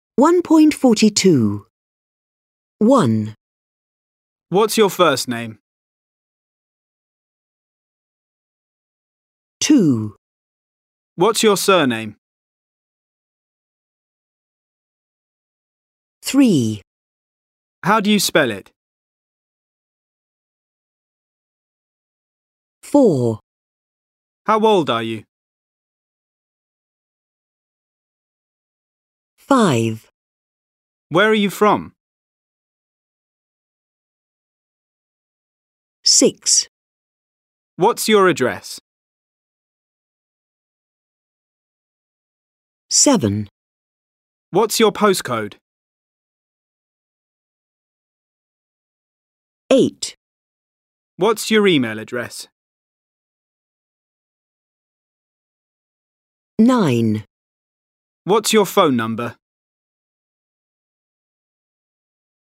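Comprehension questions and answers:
Activity 1.5 Listen. Complete Mark's questions to Micaela.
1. your surname?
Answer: What's

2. do you spell it?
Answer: How

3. old are you?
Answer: How

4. Where are you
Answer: from

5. your address?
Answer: What's

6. your postcode?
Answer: What's

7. What's your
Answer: email

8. What's your phone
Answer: number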